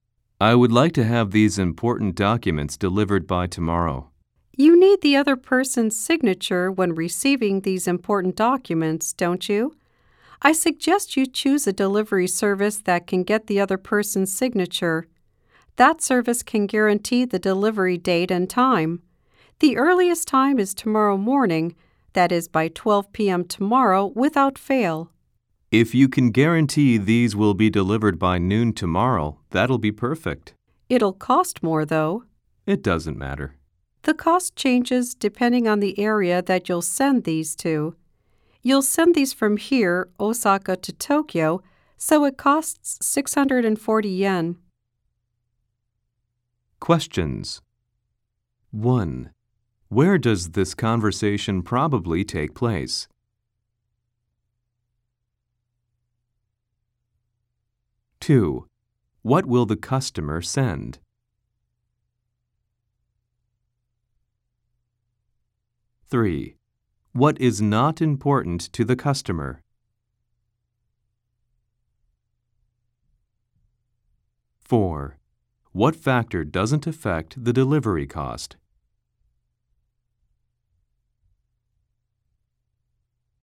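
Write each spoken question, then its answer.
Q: Where does this conversation probably take place?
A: At a post office or delivery service counter

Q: What will the customer send?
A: Important documents

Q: What is not important to the customer?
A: The cost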